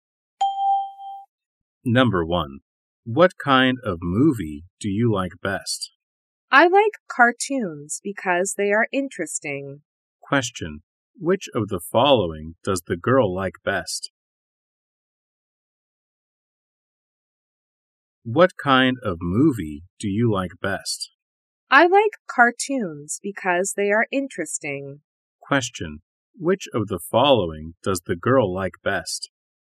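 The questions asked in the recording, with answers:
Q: Which of the following does the girl like best?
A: Cartoons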